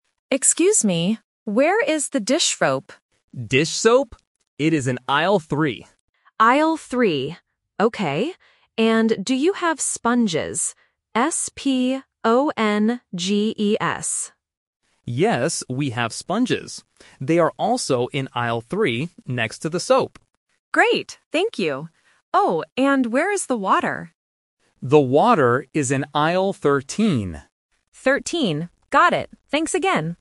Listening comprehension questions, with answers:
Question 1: What is the customer looking for first?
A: Dish soap

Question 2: What word does the customer spell?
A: S-P-O-N-G-E-S

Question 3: Where are the sponges?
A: In Aisle 3